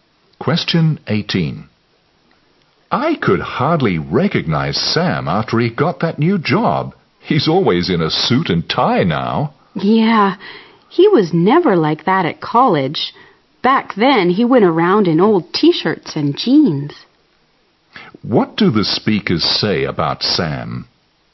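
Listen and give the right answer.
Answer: He dresses formally now, unlike at college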